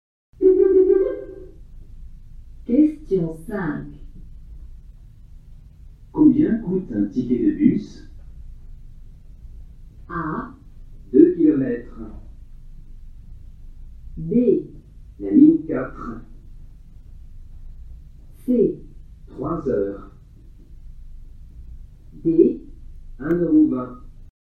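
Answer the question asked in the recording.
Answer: D: 1,20 €.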